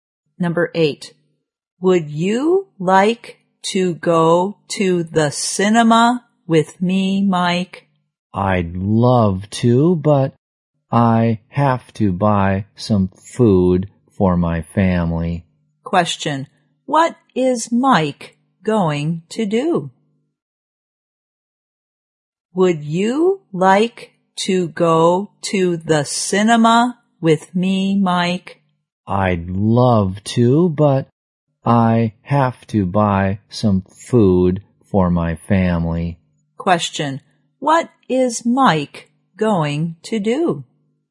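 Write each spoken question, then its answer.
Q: What is Mike going to do?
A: Buy some food for his family.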